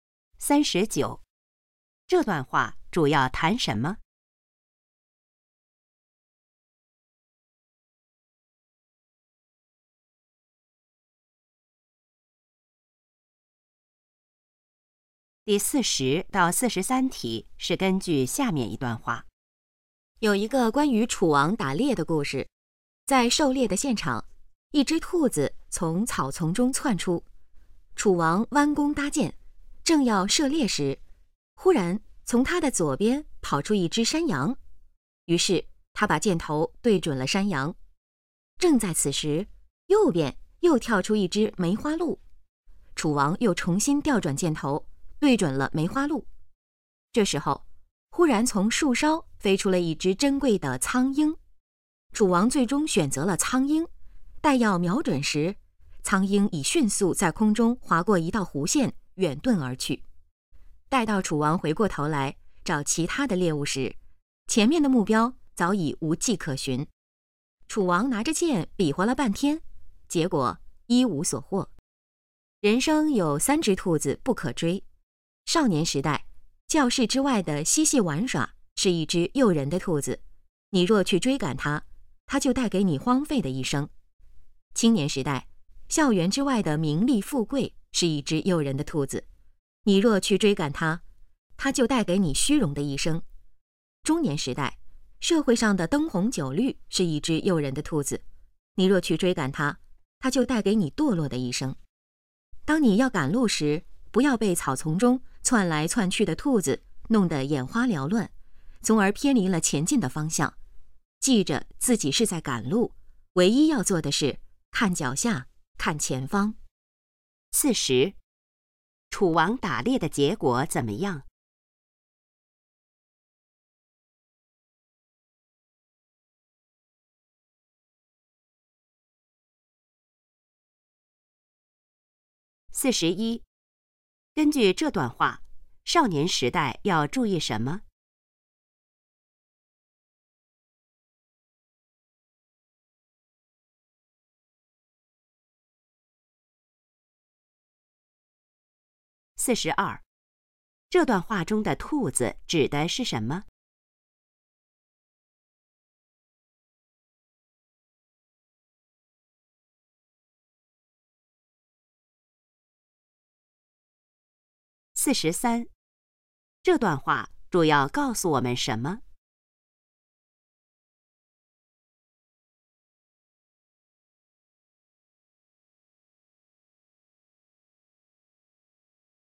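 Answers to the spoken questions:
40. 一无所获
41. 不要贪恋教室之外的嬉戏玩耍
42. 诱惑
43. 不要被诱惑而偏离前进的方向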